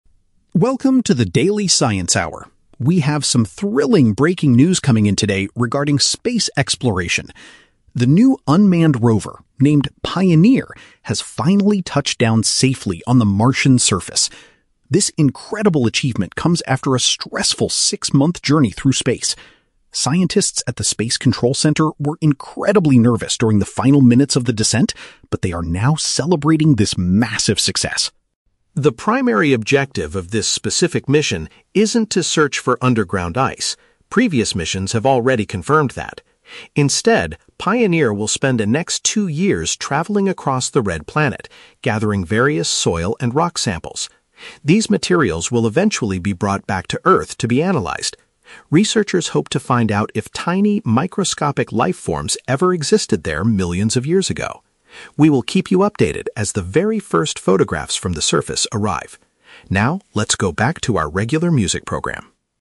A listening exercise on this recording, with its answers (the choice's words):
Listen to the radio news bulletin. For each question, choose the correct answer (A, B, or C).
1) How did the scientists feel right before the robot landed?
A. They were very anxious about the final part of the journey.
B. They were celebrating because the robot successfully found ice.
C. They were deeply disappointed by the long six-month delay.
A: They were very anxious about the final part of the journey.

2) What is the main task that the 'Pioneer' robot needs to do?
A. To search for hidden water beneath the planet's surface.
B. To collect dirt and stones so researchers can study them later.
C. To prepare a safe landing area for future human astronauts.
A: To collect dirt and stones so researchers can study them later.

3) What will the radio station broadcast immediately after this news report?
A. The very first pictures taken by the rover.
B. An interview with the space center researchers.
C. Their normal schedule of songs and entertainment.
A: Their normal schedule of songs and entertainment.

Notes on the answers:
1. The editor says the scientists were "incredibly nervous during the final minutes of the descent." "Nervous" is paraphrased as "anxious," and "final minutes of the descent" is paraphrased as "the final part of the journey." Option B is a trap; the word "celebrating" is used, but they are celebrating the landing, not finding ice. Option C is a trap; the "six-month journey" is mentioned, but they are not disappointed by it.
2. The audio states the rover will be "gathering various soil and rock samples" to "be analyzed." This is paraphrased as "collect dirt and stones" to "study them later." Option A is the trap; the audio explicitly states that the objective "isn't to search for underground ice." Option C is plausible for a space mission but is never mentioned in the audio.
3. At the end of the report, the editor says, "Now, let's go back to our regular music program." This is paraphrased as "normal schedule of songs and entertainment." Option A is a trap; the editor mentions "the very first photographs," but says they will update the listeners when they arrive, not right now. Option B is plausible but not mentioned.

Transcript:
News Editor: Welcome to the Daily Science Hour. We have some thrilling breaking news coming in today regarding space exploration. The new unmanned rover, named 'Pioneer', has finally touched down safely on the Martian surface. This incredible achievement comes after a stressful six-month journey through space. Scientists at the space control center were incredibly nervous during the final minutes of the descent, but they are now celebrating this massive success.
The primary objective of this specific mission isn't to search for underground ice—previous missions have already confirmed that. Instead, Pioneer will spend the next two years traveling across the red planet, gathering various soil and rock samples. These materials will eventually be brought back to Earth to be analyzed. Researchers hope to find out if tiny, microscopic life forms ever existed there millions of years ago. We will keep you updated as the very first photographs from the surface arrive. Now, let's go back to our regular music program.